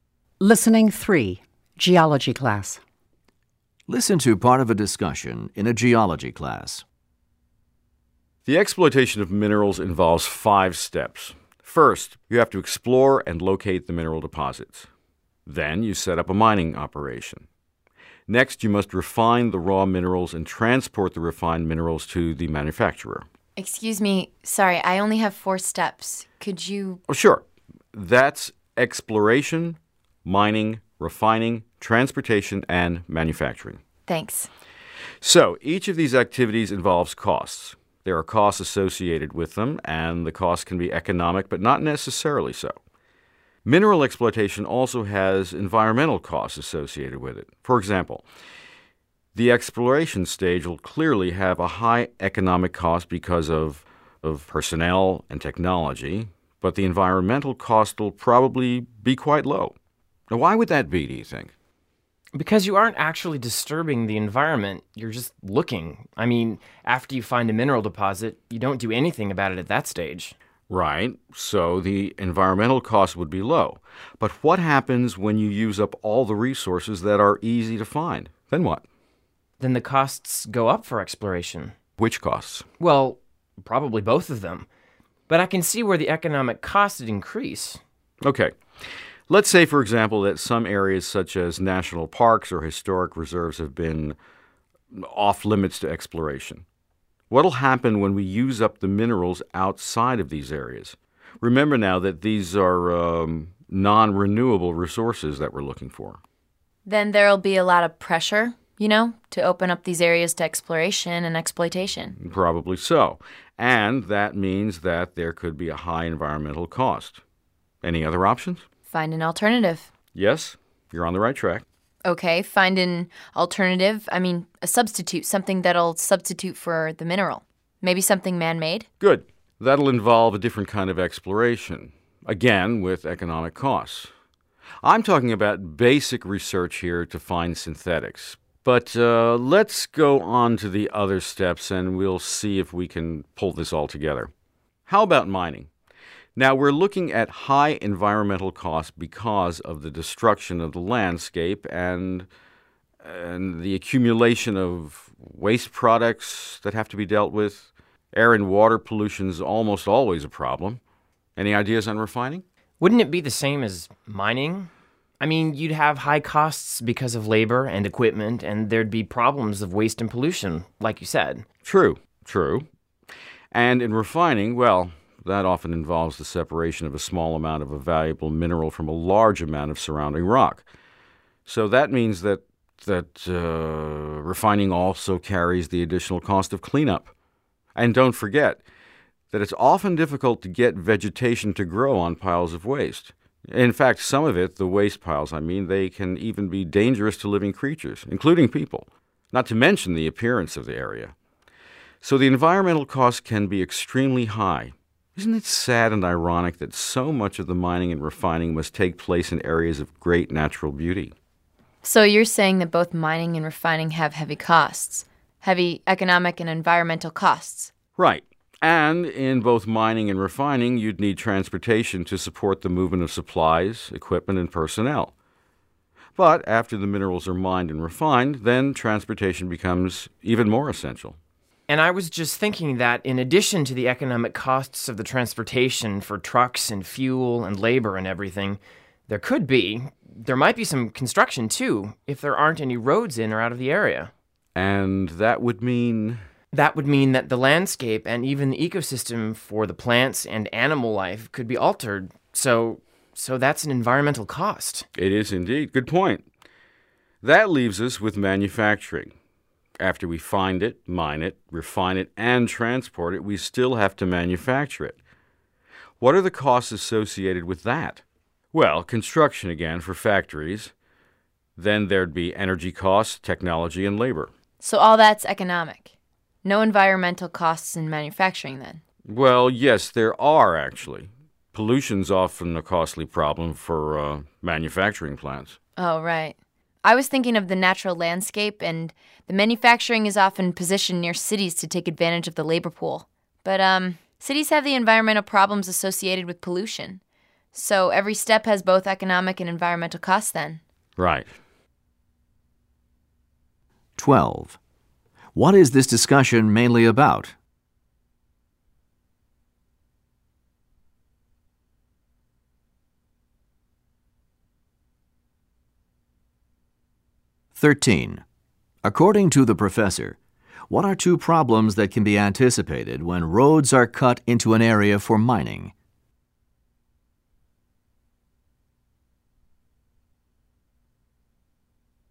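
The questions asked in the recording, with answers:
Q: According to the professor, what are two problems that can be anticipated when roads are cut into an area for mining?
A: The landscape and the ecosystem for plants and animals could be altered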